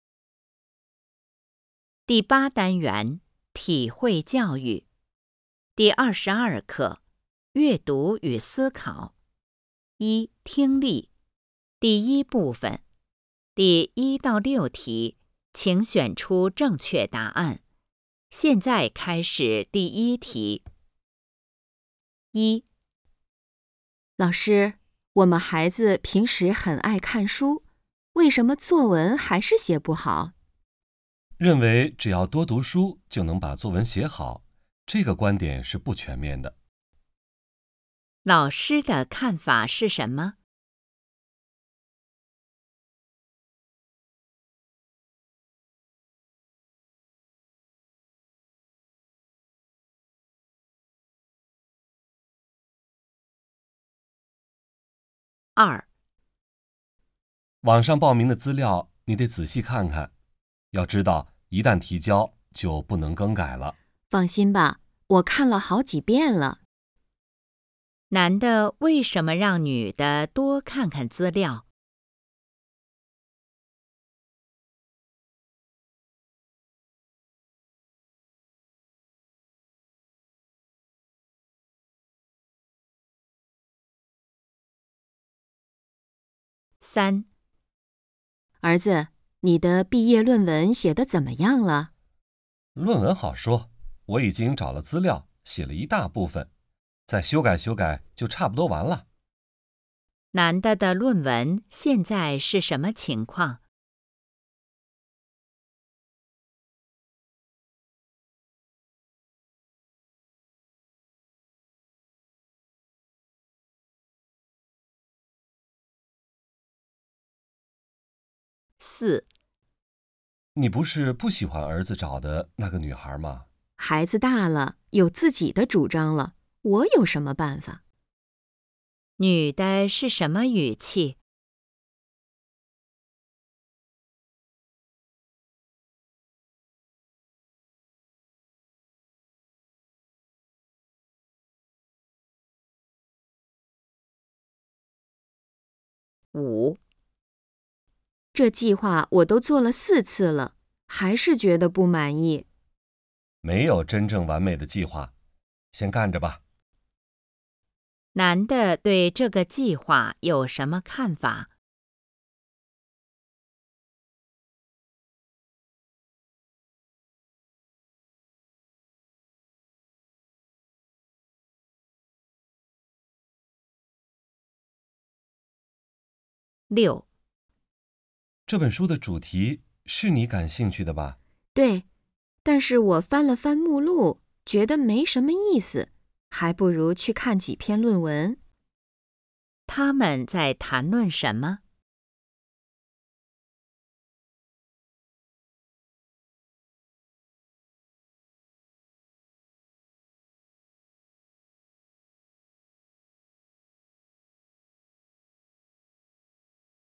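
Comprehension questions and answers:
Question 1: 老师的看法是什么?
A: 多读书不一定能写好作文

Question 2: 男的为什么让女的多看看资料?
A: 报名后就不能改

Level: HSK 5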